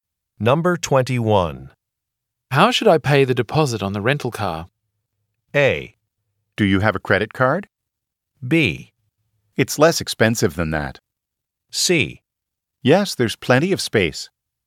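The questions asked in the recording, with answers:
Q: How should I pay the deposit on the rental car?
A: A: Do you have a credit card?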